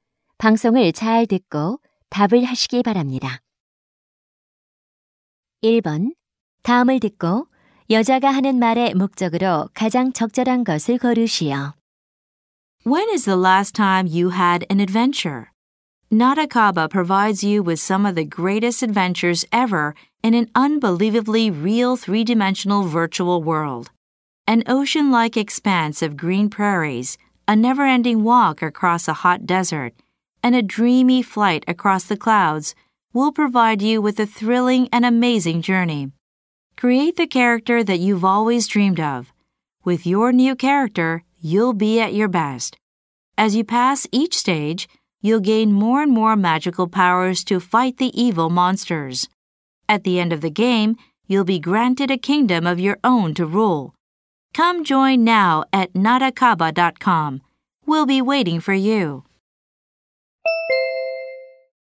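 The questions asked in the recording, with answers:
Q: 다음을 듣고 여자가 하는 말의 목적으로 가장 적절한 것을 고르시오.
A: 가상현실 게임(나다카바)을 광고하려고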